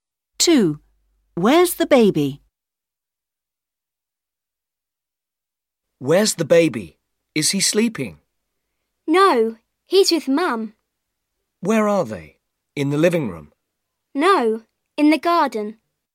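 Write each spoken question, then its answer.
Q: Where's the baby?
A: In the garden with Mum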